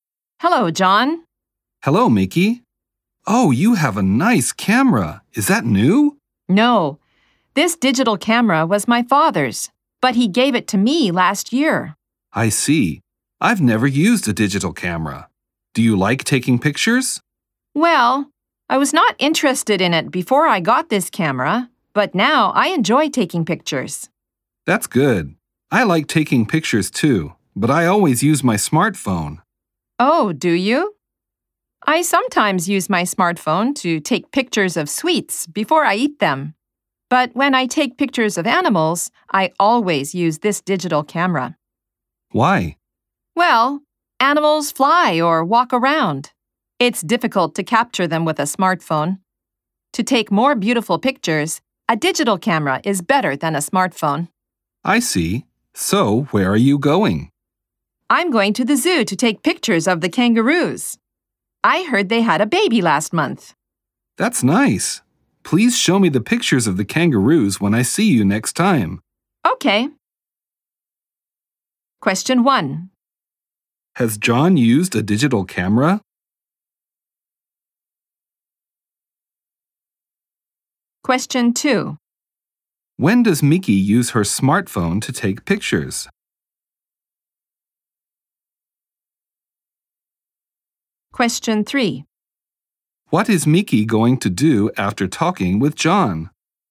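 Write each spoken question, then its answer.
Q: Has John used a digital camera?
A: No, he hasn't.

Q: When does Mickey use her smartphone to take pictures?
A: Before she eats sweets, to take pictures of them.

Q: What is Mickey going to do after talking with John?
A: Go to the zoo to take pictures of the kangaroos.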